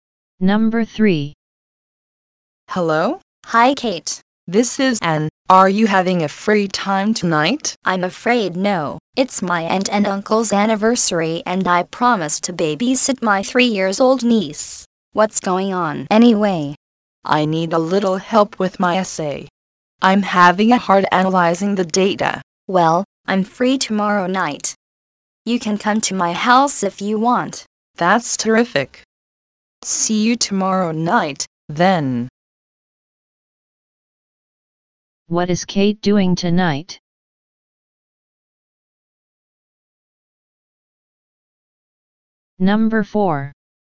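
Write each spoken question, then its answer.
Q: What is Kate doing tonight?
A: Babysitting her 3-year-old niece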